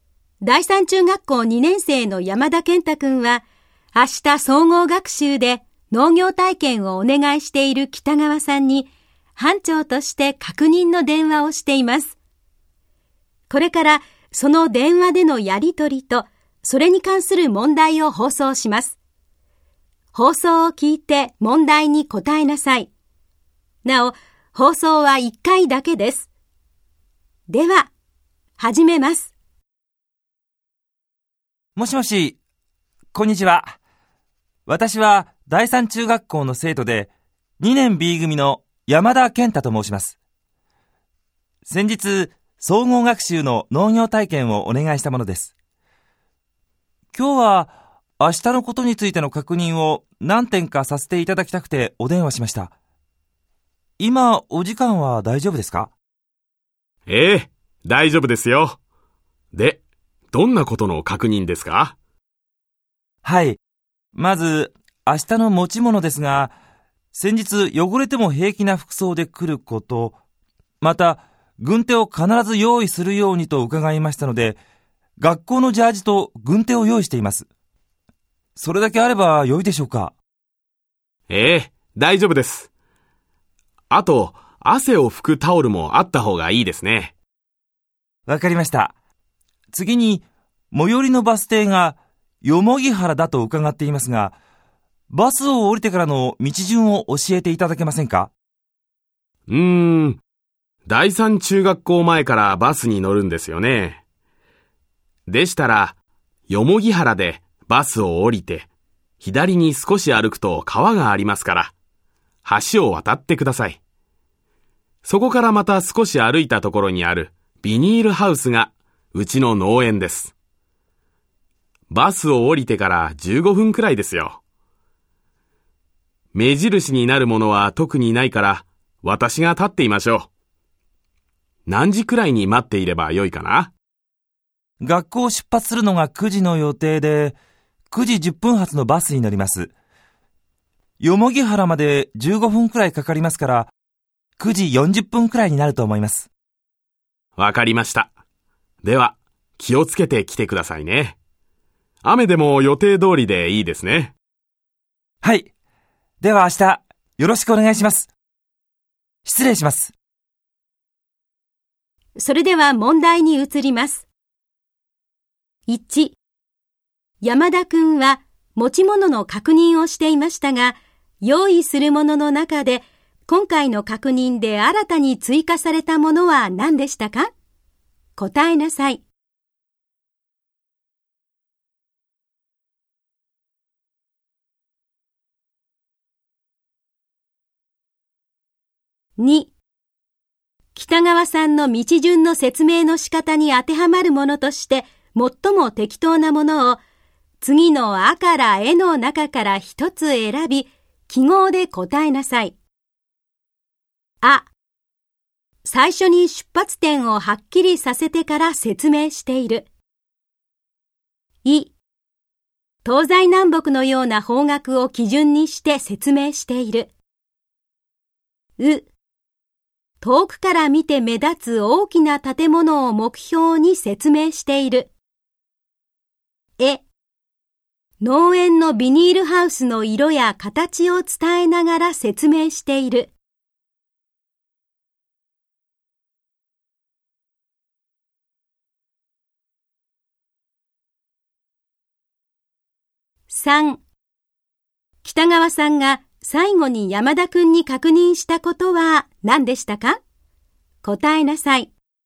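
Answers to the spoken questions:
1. 汗を拭くタオル
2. あ: 最初に出発点をはっきりさせてから説明している。
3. 雨でも予定通り(農業体験を行う)でいいかということ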